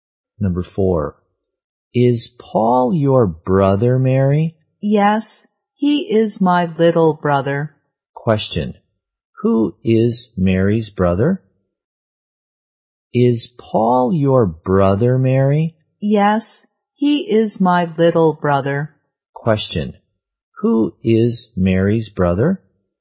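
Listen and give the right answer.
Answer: Paul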